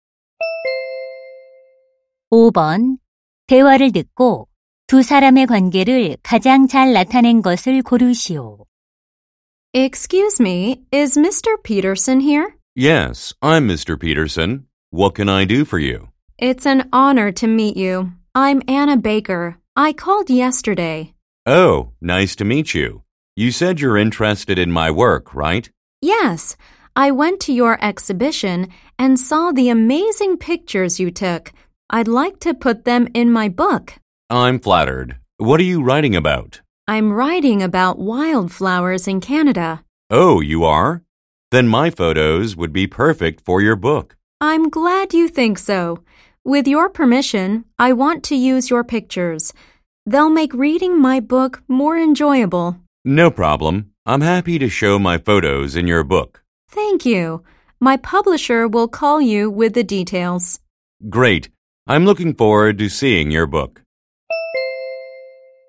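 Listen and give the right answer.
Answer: 사진작가 – 작가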